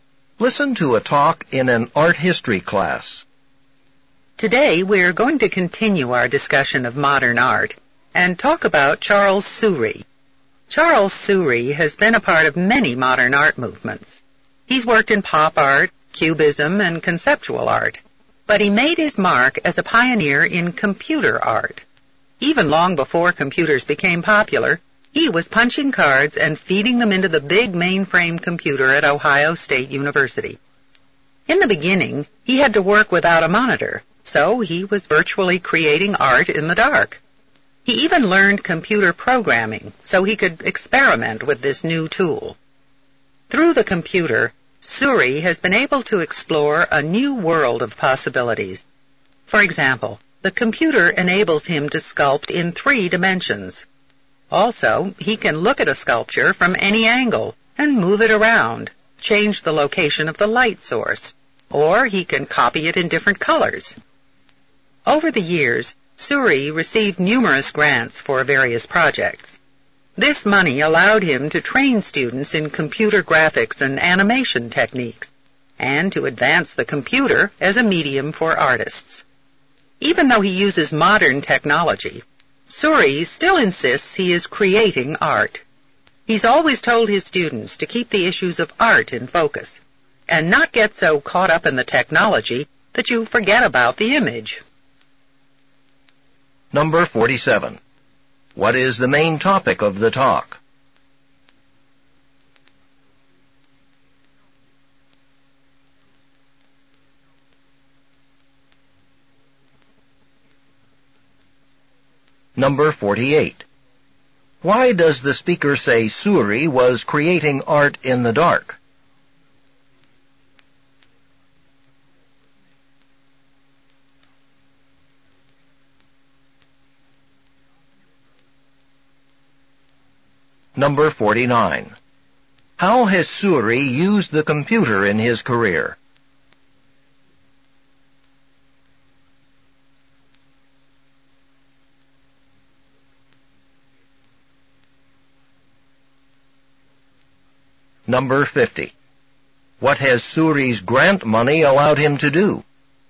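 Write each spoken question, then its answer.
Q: What is the main topic of the talk?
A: Charles Soury, a pioneer of computer art

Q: Why does the speaker say Soury was creating art in the dark?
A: At first he had to work without a monitor

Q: How has Soury used the computer in his career?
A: To sculpt in three dimensions and view, move, relight and recolor sculptures

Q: What has Soury's grant money allowed him to do?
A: Train students in computer graphics and animation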